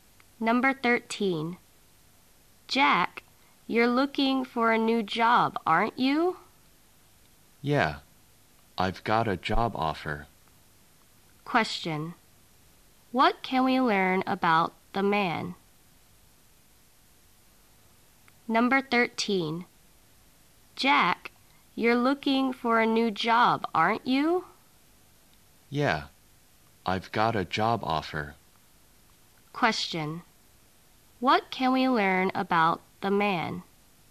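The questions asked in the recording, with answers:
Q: What can we learn about the man?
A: He has got a job offer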